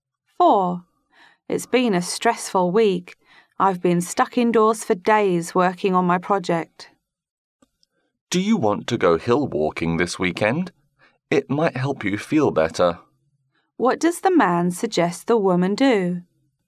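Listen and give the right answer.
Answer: Go hill walking this weekend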